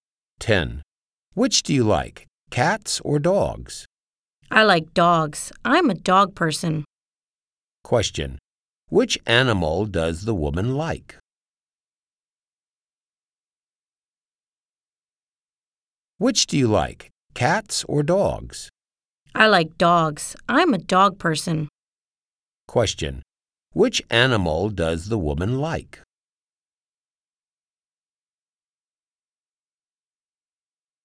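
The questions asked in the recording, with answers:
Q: Which animal does the woman like?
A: Dogs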